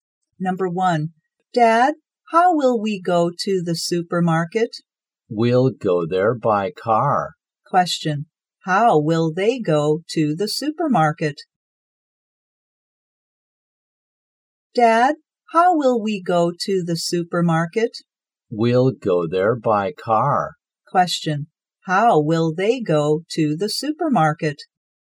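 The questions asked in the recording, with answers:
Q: how will they go to the supermarket?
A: By car.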